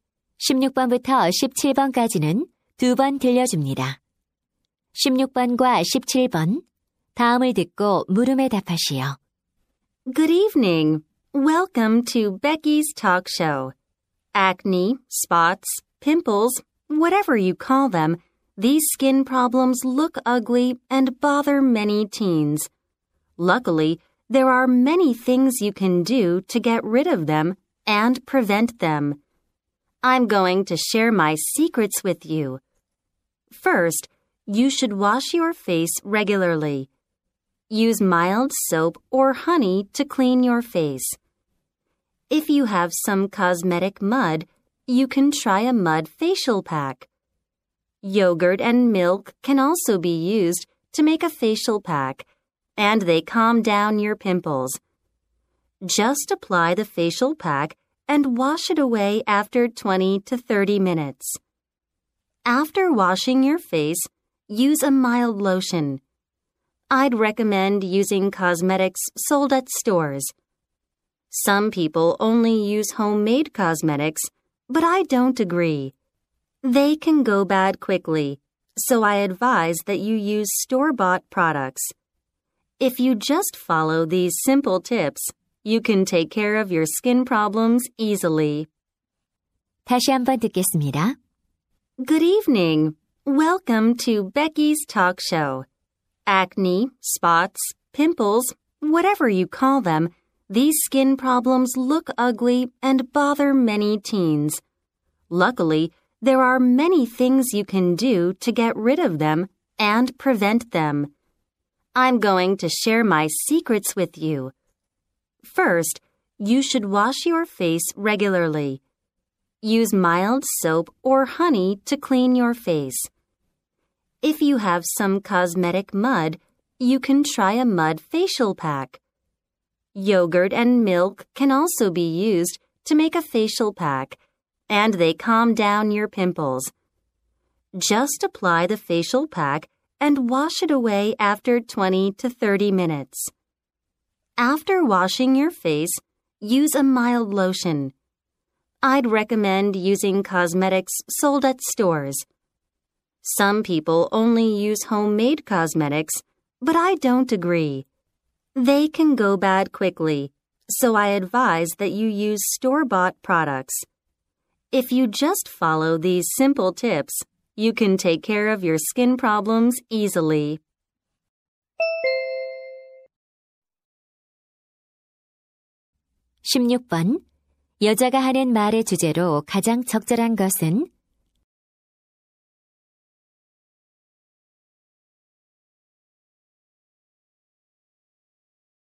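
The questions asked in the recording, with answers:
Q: 여자가 하는 말의 주제로 가장 적절한 것은?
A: 여드름을 관리하고 예방하는 방법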